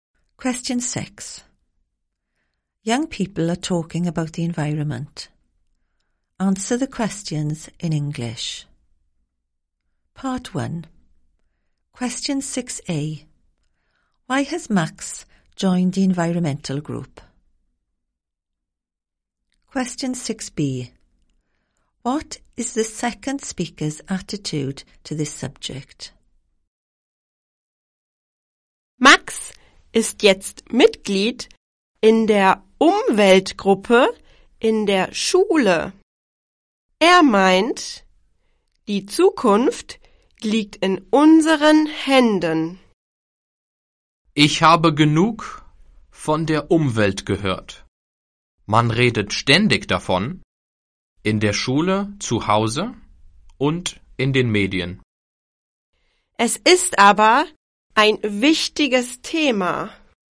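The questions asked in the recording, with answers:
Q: Why has Max joined the environmental group?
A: He thinks the future is in our hands

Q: What is the second speaker's attitude to this subject?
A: Fed up hearing about it, but thinks it is important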